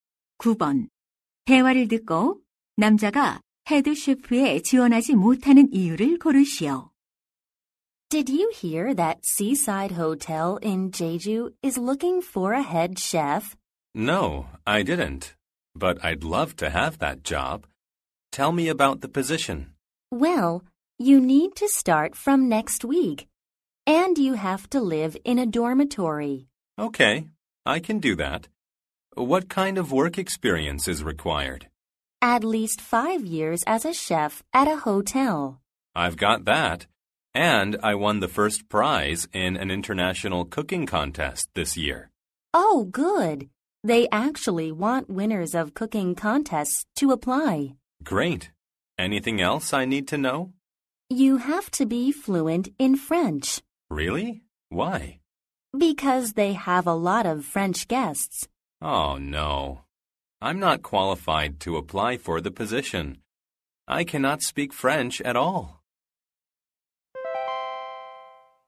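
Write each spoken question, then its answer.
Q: 대화를 듣고 남자가 헤드 셰프에 지원하지 못하는 이유를 고르시오.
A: 프랑스어를 전혀 하지 못해서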